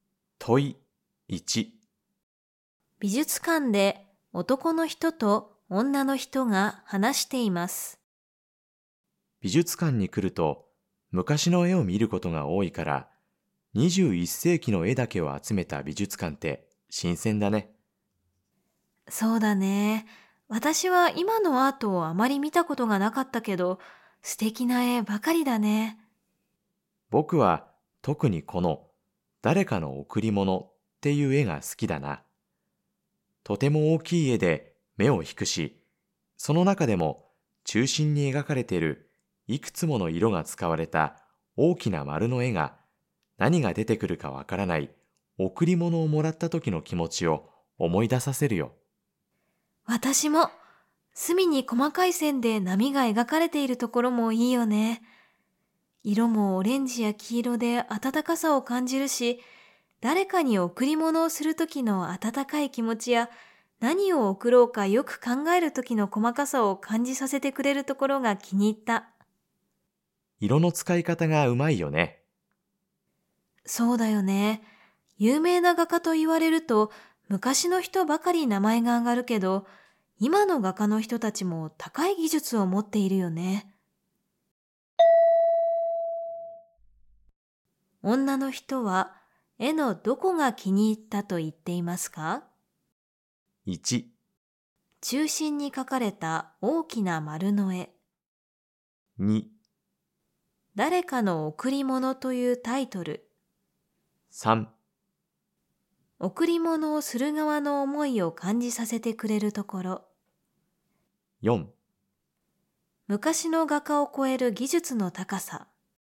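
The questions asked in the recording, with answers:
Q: 女の人は、絵のどこが気に入ったと言っていますか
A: 3: 贈り物をする側の思いを感じさせてくれるところ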